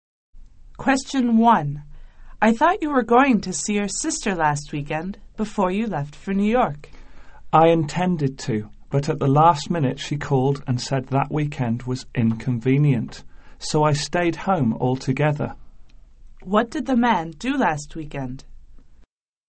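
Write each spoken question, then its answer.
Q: What did the man do last weekend?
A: He stayed home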